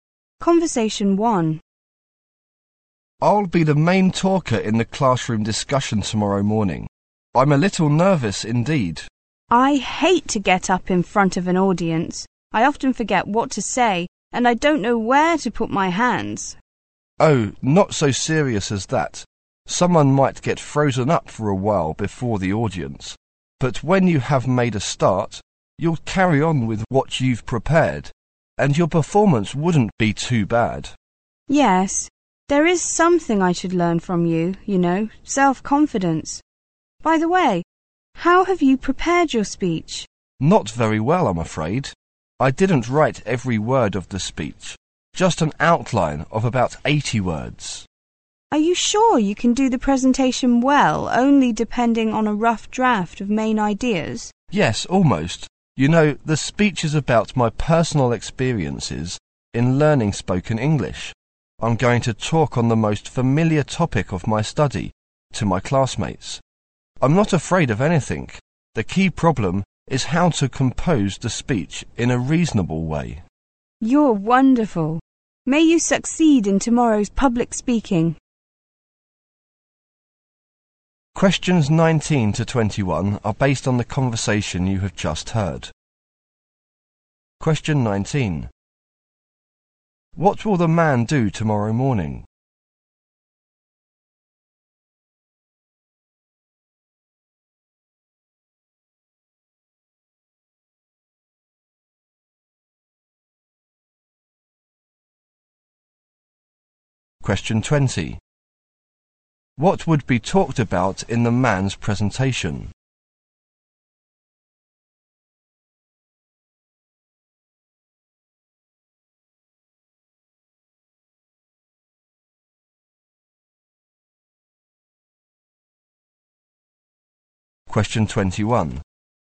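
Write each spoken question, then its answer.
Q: What will the man do tomorrow morning?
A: Be the main speaker in a classroom discussion.

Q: What would be talked about in the man's presentation?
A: His personal experiences in learning spoken English.

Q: What is the key to a successful speech, according to the speaker?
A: Composing the speech in a reasonable way.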